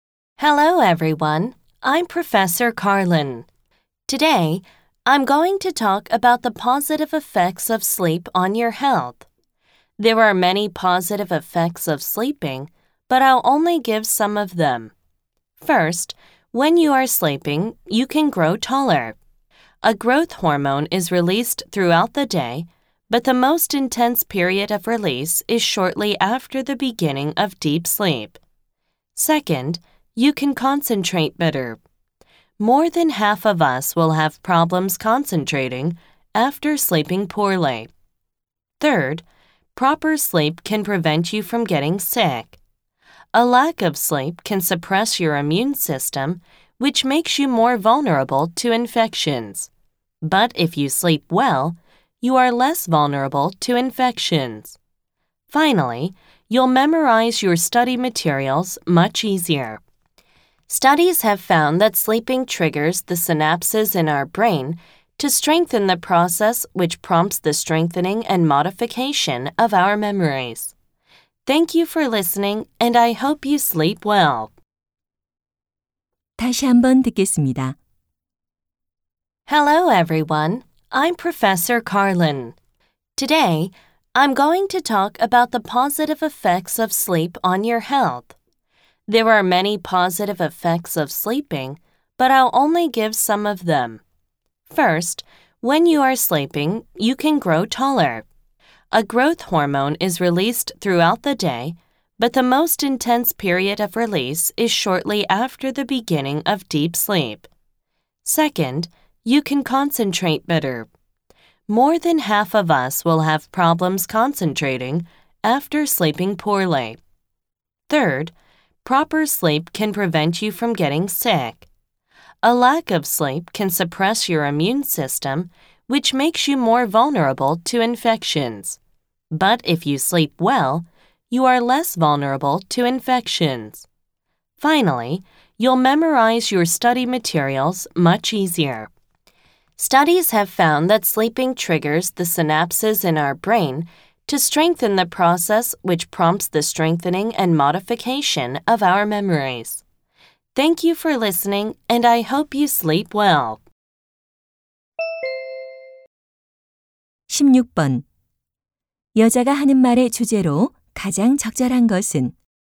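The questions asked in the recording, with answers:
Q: 여자가 하는 말의 주제로 가장 적절한 것은?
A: 수면이 건강에 미치는 긍정적인 효과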